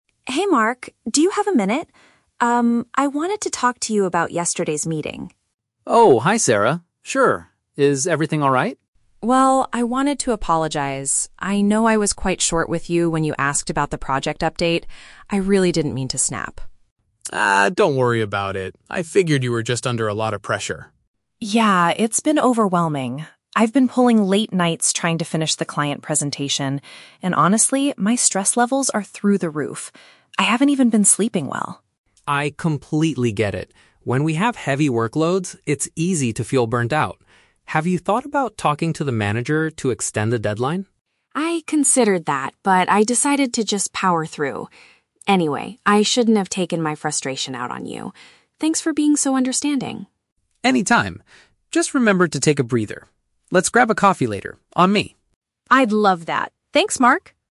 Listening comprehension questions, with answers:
Listen to the conversation between two colleagues and choose the correct answer (A, B, or C) for each question.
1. Why did Sarah want to talk to Mark?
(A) To ask for his help with a presentation.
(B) To say sorry for her recent behavior.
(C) To complain about their manager.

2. What is the main reason for Sarah's stress?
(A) She has too much work to do.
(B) She is having serious health problems.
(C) She had a big argument with a client.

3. What did Mark suggest Sarah should do?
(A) Ask for more time to finish her task.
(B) Drink more coffee to stay awake.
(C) Take a few days off from work.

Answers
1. B
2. A
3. A

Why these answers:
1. The Key: Sarah says "I wanted to apologize" and "I didn't mean to snap", which means she is saying sorry for how she acted (her behavior). The Trap (A): The script mentions the "client presentation", but she didn't ask Mark to help her with it. Plausible but not mentioned (C): They talk about the manager later, but she didn't come to complain about him.
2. The Key: Sarah mentions "pulling late nights to finish the client presentation" and Mark says she has "heavy workloads". This means she has too much work. The Trap (B): Sarah mentions she hasn't been "sleeping well" (a health-related issue), but this is a result of the stress, not the main cause. Plausible but not mentioned (C): She mentions a "client presentation", but she never says she argued with the client.
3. The Key: Mark asks, "Have you thought about talking to the manager to extend the deadline?". "Extend the deadline" means asking for more time. The Trap (B): Mark invites her to "grab a coffee later" as a friendly act to relax, not as a solution to help her stay awake for work. Plausible but not mentioned (C): Taking time off is a logical solution for stress, but Mark did not suggest this in the conversation.

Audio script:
Sarah: Hey Mark, do you have a minute? I wanted to talk to you about yesterday's meeting.
Mark: Oh, hi Sarah. Sure. Is everything alright?
Sarah: Well, I wanted to apologize. I know I was quite short with you when you asked about the project update. I really didn't mean to snap.
Mark: Ah, don't worry about it. I figured you were just under a lot of pressure.
Sarah: Yeah, it's been overwhelming. I've been pulling late nights trying to finish the client presentation, and honestly, my stress levels are through the roof. I haven't even been sleeping well.
Mark: I completely get it. When we have heavy workloads, it's easy to feel burnt out. Have you thought about talking to the manager to extend the deadline?
Sarah: I considered that, but I decided to just power through. Anyway, I shouldn't have taken my frustration out on you. Thanks for being so understanding.
Mark: Anytime. Just remember to take a breather. Let's grab a coffee later, on me.

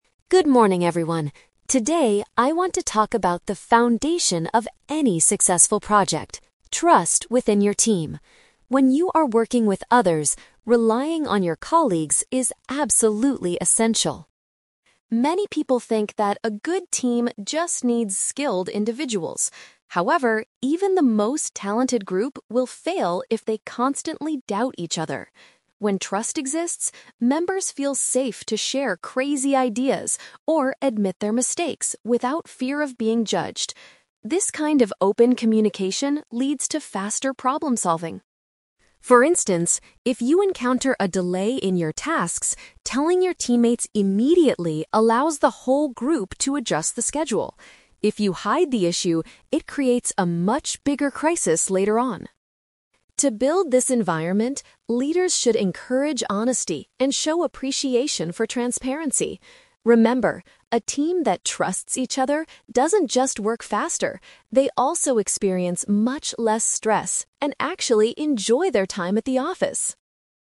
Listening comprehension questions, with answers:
Listen to an HR expert giving a presentation about teamwork. Choose the best answer (A, B, or C) for each question.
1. According to the speaker, what will happen if team members constantly doubt each other?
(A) Highly skilled workers will eventually leave the company.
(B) The group will not be successful despite their talents.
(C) The manager will have to hire new individuals.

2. What is the benefit of informing your team about a delay immediately?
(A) It allows the group to modify their timeline.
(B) It prevents the leader from giving you extra work.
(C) It proves that you are working faster than others.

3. How can managers help build a trusting environment?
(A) By rewarding employees who finish their projects the fastest.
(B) By organizing weekly social events for the office staff.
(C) By valuing clear and truthful behavior from their workers.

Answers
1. B
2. A
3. C

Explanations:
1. The speaker states that "even the most talented group will fail if they constantly doubt each other." Paraphrasing: talented group = despite their talents; fail = not be successful.
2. The speaker says that telling your teammates about a delay allows the group to "adjust the schedule." Paraphrasing: adjust the schedule = modify their timeline.
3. The speaker advises leaders to "encourage honesty and show appreciation for transparency." Paraphrasing: honesty and transparency = clear and truthful behavior; show appreciation = valuing.

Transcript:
Speaker: Good morning, everyone. Today, I want to talk about the foundation of any successful project: trust within your team. When you are working with others, relying on your colleagues is absolutely essential.
Many people think that a good team just needs skilled individuals. However, even the most talented group will fail if they constantly doubt each other. When trust exists, members feel safe to share crazy ideas or admit their mistakes without fear of being judged. This kind of open communication leads to faster problem-solving.
For instance, if you encounter a delay in your tasks, telling your teammates immediately allows the whole group to adjust the schedule. If you hide the issue, it creates a much bigger crisis later on.
To build this environment, leaders should encourage honesty and show appreciation for transparency. Remember, a team that trusts each other doesn't just work faster; they also experience much less stress and actually enjoy their time at the office.

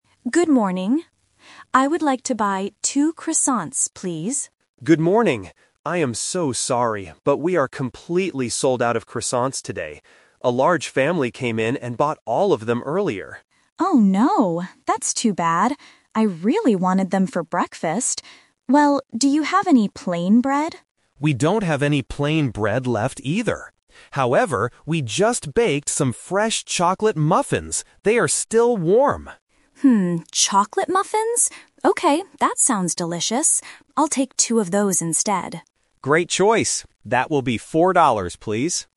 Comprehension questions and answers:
Listen to the conversation at a bakery, and choose the correct answer (A, B, or C) for each question.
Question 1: What did the customer originally want to buy?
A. Chocolate muffins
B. Croissants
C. Apple pies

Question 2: Why can't the customer get the croissants?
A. They are all sold out.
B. They are too expensive.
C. They are not baked yet.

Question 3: What does the customer decide to buy at the end?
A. Plain bread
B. Croissants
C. Chocolate muffins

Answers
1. B
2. A
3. C

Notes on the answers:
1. The customer says at the very beginning, "I would like to buy two croissants, please." Option (A) is the trap; chocolate muffins are what she buys at the end, not what she originally wanted. Option (C) is a plausible bakery item, but it is never mentioned.
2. The baker clearly states, "we are completely sold out of croissants today." Options (B) and (C) are common problems when buying food, but they are not the reasons given in this conversation.
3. The baker suggests the chocolate muffins, and the customer agrees, saying, "I'll take two of those instead." Option (A) is a trap; the customer asks for plain bread, but the baker says they don't have any left. Option (B) is a trap; she wanted croissants, but couldn't get them.

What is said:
Customer: Good morning! I would like to buy two croissants, please.
Baker: Good morning! I am so sorry, but we are completely sold out of croissants today. A large family came in and bought all of them earlier.
Customer: Oh no, that's too bad. I really wanted them for breakfast. Well, do you have any plain bread?
Baker: We don't have any plain bread left, either. However, we just baked some fresh chocolate muffins. They are still warm!
Customer: Hmm, chocolate muffins? Okay, that sounds delicious.

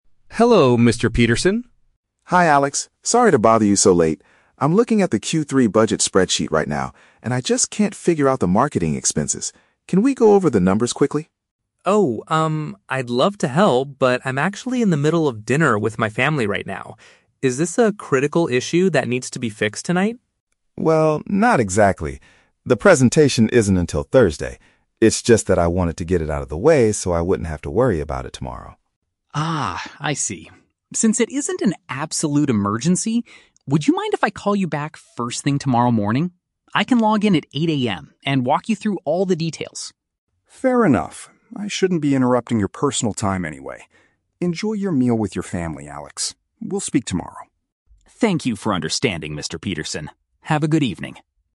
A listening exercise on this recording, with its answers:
Listen to the phone conversation between an employee (Alex) and his boss (Mr. Peterson), and choose the correct answer (A, B, or C).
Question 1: What is the main reason Mr. Peterson called Alex?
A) To ask him to return to the office for an emergency.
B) To discuss some confusing financial figures.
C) To invite him and his family to a dinner party.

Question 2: Why does Alex refuse to help his boss immediately?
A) He is currently having a meal with his relatives.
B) He needs to prepare for a presentation on Thursday.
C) He does not know how to fix the marketing data.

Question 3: What do the two men agree to do at the end of the call?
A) Alex will explain the information at the start of the next workday.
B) Mr. Peterson will finish the spreadsheet alone tonight.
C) Alex will send a text message with the details after he finishes eating.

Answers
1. B
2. A
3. A

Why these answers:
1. Mr. Peterson says he is looking at the "budget spreadsheet" and can't figure out the "marketing expenses." "Financial figures" is a paraphrase of budget and expenses.
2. Alex explains that he is "in the middle of dinner with my family." "Having a meal with his relatives" is a direct paraphrase of this statement.
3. Alex offers to call his boss back "first thing tomorrow morning" and "log in at 8 AM" to walk him through the details. "Start of the next workday" is a paraphrase of tomorrow morning at 8 AM.

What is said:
Alex: Hello, Mr. Peterson.
Mr. Peterson: Hi Alex, sorry to bother you so late. I'm looking at the Q3 budget spreadsheet right now and I just can't figure out the marketing expenses. Can we go over the numbers quickly?
Alex: Oh, um, I'd love to help, but I'm actually in the middle of dinner with my family right now. Is this a critical issue that needs to be fixed tonight?
Mr. Peterson: Well, not exactly. The presentation isn't until Thursday. It's just that I wanted to get it out of the way so I wouldn't have to worry about it tomorrow.
Alex: Ah, I see. Since it isn't an absolute emergency, would you mind if I call you back first thing tomorrow morning? I can log in at 8 AM and walk you through all the details.
Mr. Peterson: Fair enough. I shouldn't be interrupting your personal time anyway. Enjoy your meal with your family, Alex. We'll speak tomorrow.
Alex: Thank you for understanding, Mr. Peterson. Have a good evening.

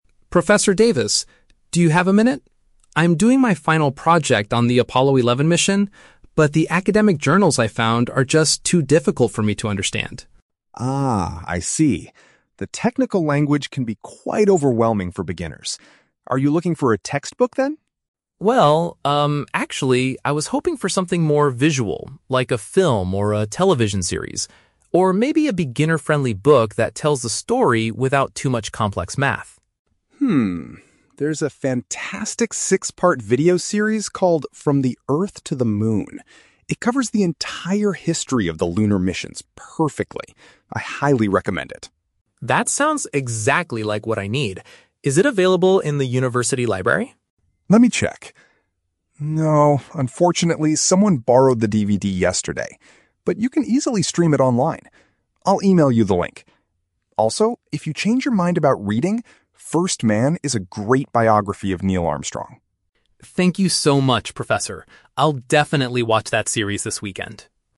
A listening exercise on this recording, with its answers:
Listen to the conversation between a student and his professor, and choose the correct answer (A, B, or C) for each question.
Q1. Why is the student asking the professor for help?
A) He wants help solving some complex mathematical equations.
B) He finds the scientific articles too hard to read.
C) He needs to borrow a textbook from the professor's office.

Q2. What type of resource does the student primarily want?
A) A traditional university textbook.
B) A printed biography of a famous astronaut.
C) A visual program like a documentary or show.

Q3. How will the student access the recommended video series?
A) By watching it on the internet.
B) By borrowing a DVD from the campus library.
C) By purchasing it from a local bookstore.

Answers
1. B
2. C
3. A

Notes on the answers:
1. The student says the "academic journals... are just too difficult for me to understand" (academic journals = scientific articles; difficult = hard to read). Option (A) is The Trap: He mentions "complex math," but as something he wants to avoid reading about, not something he needs help solving. Option (C) is plausible but not mentioned.
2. The student says he is hoping for "something more visual, like a film or a television series" (which paraphrases to a visual program/documentary). Option (A) is The Trap: The professor asks if he wants a textbook, but the student rejects the idea ("Well, actually..."). Option (B) is also a trap: The professor suggests a biography (First Man), but that is a backup option, not what the student primarily asked for.
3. The professor tells him, "you can easily stream it online" (stream online = watch on the internet). Option (B) is The Trap: The student asks if it's in the university library, but the professor says no because "someone borrowed the DVD yesterday." Option (C) is not mentioned in the audio.

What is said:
Student (Mark): Professor Davis, do you have a minute? I'm doing my final project on the Apollo 11 mission, but the academic journals I found are just too difficult for me to understand.
Professor Davis: Ah, I see. The technical language can be quite overwhelming for beginners. Are you looking for a textbook, then?
Student (Mark): Well, um, actually, I was hoping for something more visual, like a film or a television series. Or maybe a beginner-friendly book that tells the story without too much complex math.
There's a fantastic six-part video series called From the Earth to the Moon. It covers the entire history of the lunar missions perfectly. I highly recommend it.
Student (Mark): That sounds exactly like what I need! Is it available in the university library?
Professor Davis: Let me check... No, unfortunately, someone borrowed the DVD yesterday. But you can easily stream it online. I'll email you the link. Also, if you change your mind about reading, First Man is a great biography of Neil Armstrong.
Student (Mark): Thank you so much, Professor! I'll definitely watch that series this weekend.

